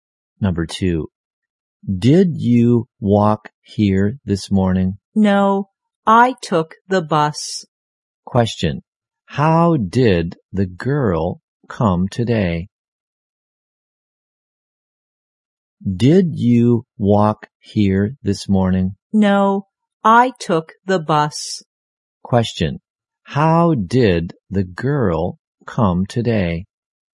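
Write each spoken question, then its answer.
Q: How did the girl come today?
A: By bus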